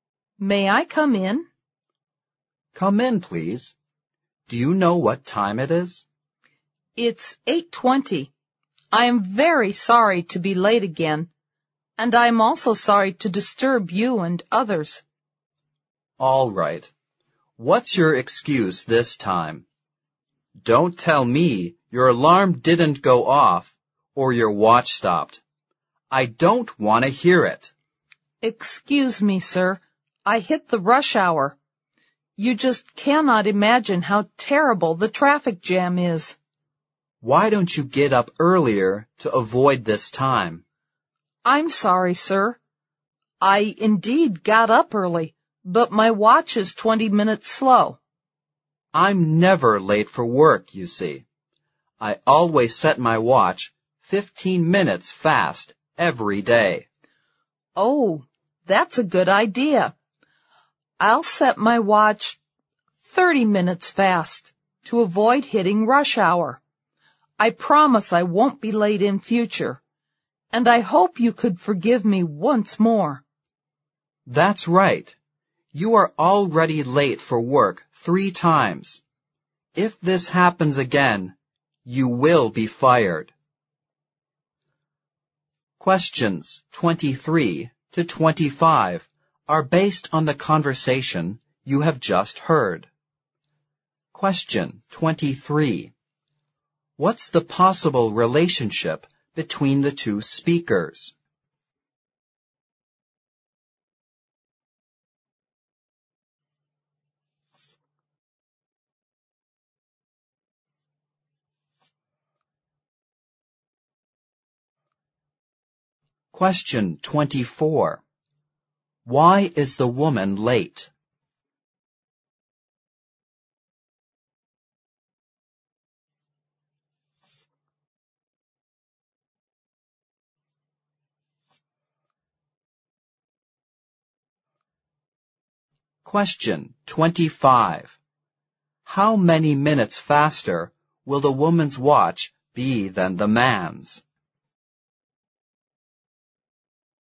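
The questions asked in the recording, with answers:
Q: What's the possible relationship between the two speakers?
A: Boss and employee

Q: How many minutes faster will the woman's watch be than the man's?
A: 15 minutes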